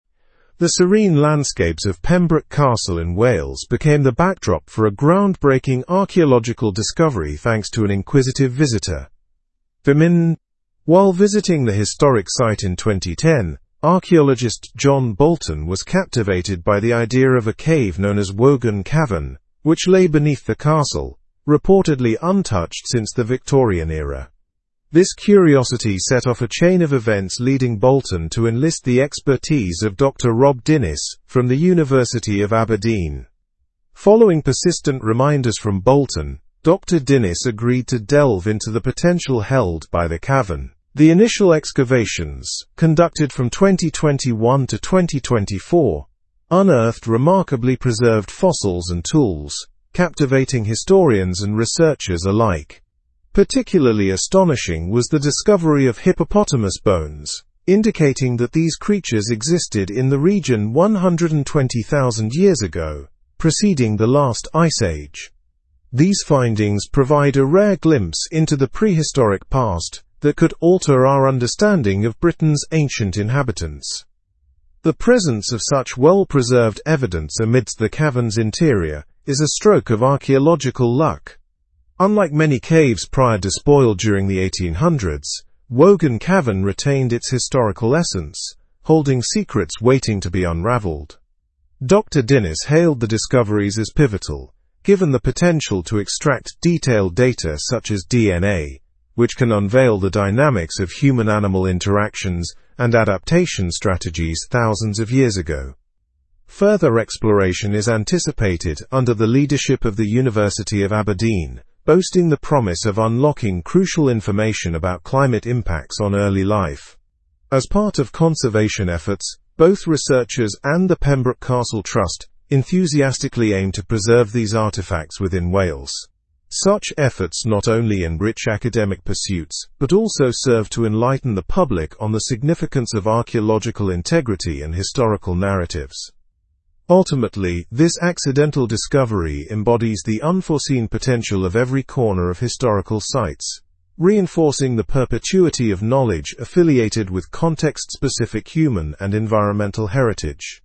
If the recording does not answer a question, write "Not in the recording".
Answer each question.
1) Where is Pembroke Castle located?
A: In Wales.

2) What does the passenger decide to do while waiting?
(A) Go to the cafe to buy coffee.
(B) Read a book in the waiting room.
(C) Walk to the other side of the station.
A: Not in the recording

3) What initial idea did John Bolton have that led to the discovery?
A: The idea to investigate Wogan Cavern.

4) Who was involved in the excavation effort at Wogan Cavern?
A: Archaeologist John Bolton and Dr. Rob Dinnis were involved.

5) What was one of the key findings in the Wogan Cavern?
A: Hippopotamus bones were discovered.

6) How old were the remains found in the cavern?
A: They were approximately 120,000 years old.

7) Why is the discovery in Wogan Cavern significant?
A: It offers insights into Britain's prehistoric past and ancient inhabitants.

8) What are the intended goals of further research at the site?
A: Unlocking crucial information about climate impacts on early life and preserving artifacts.

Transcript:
The serene landscapes of Pembroke Castle in Wales became the backdrop for a groundbreaking archaeological discovery thanks to an inquisitive visitor. While visiting the historic site in 2010, archaeologist John Bolton was captivated by the idea of a cave known as Wogan Cavern, which lay beneath the castle, reportedly untouched since the Victorian era. This curiosity set off a chain of events leading Bolton to enlist the expertise of Dr. Rob Dinnis from the University of Aberdeen.
Following persistent reminders from Bolton, Dr. Dinnis agreed to delve into the potential-held by the cavern. The initial excavations, conducted from 2021 to 2024, unearthed remarkably preserved fossils and tools, captivating historians and researchers alike. Particularly astonishing was the discovery of hippopotamus bones, indicating that these creatures existed in the region 120,000 years ago, preceding the last Ice Age. These findings provide a rare glimpse into the prehistoric past that could alter our understanding of Britain's ancient inhabitants.
The presence of such well-preserved evidence amidst the cavern's interior is a stroke of archaeological luck. Unlike many caves prior despoiled during the 1800s, Wogan Cavern retained its historical essence, holding secrets waiting to be unraveled. Dr. Dinnis hailed the discoveries as pivotal, given the potential to extract detailed data such as DNA, which can unveil the dynamics of human-animal interactions and adaptation strategies thousands of years ago.
Further exploration is anticipated under the leadership of the University of Aberdeen, boasting the promise of unlocking crucial information about climate impacts on early life. As part of conservation efforts, both researchers and the Pembroke Castle Trust enthusiastically aim to preserve these artifacts within Wales. Such efforts not only enrich academic pursuits but also serve to enlighten the public on the significance of archeological integrity and historical narratives.
Ultimately, this accidental discovery embodies the unforeseen potential of every corner of historical sites, reinforcing the perpetuity of knowledge affiliated with context-specific human and environmental heritage.
?, this accidental discovery embodies the unforeseen potential of every corner of historical sites, reinforcing the perpetuity of knowledge affiliated with context-specific human and environmental heritage.

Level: Level 4